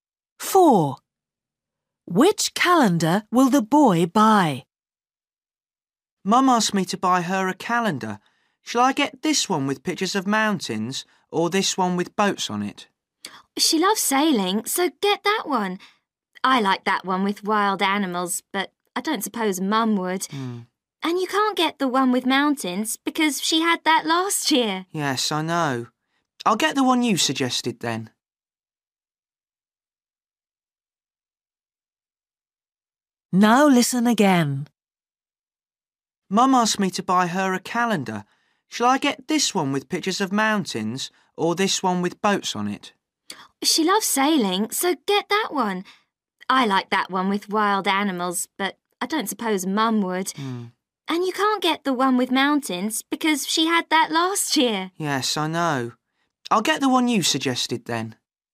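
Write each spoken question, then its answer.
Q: Which calendar will the boy buy?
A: The one with boats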